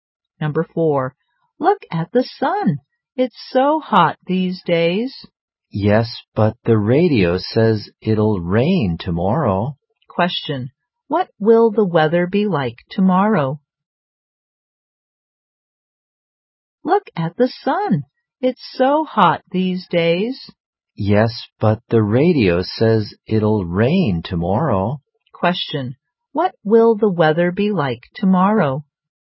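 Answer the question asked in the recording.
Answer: Rainy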